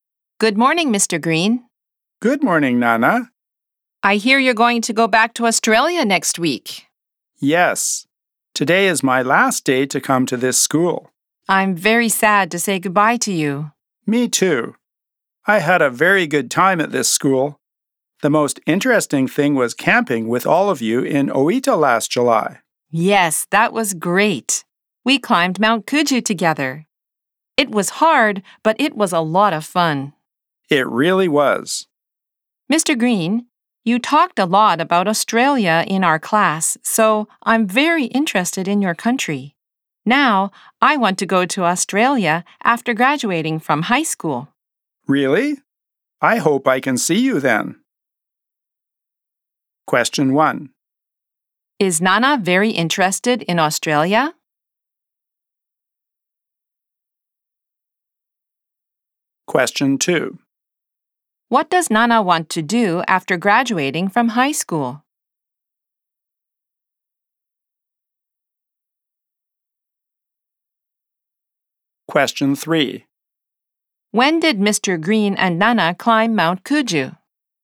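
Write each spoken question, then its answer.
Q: Is Nana very interested in Australia?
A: Yes, she is.

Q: What does Nana want to do after graduating from high school?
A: She wants to go to Australia.

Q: When did Mr. Green and Nana climb Mount Kuju?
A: Last July.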